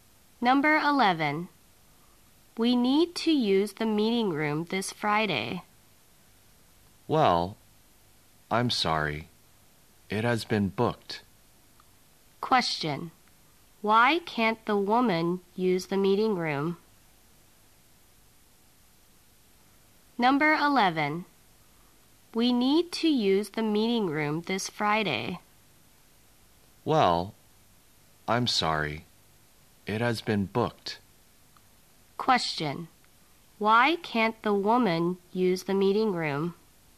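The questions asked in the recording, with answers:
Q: Why can't the woman use the meeting room?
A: It has been booked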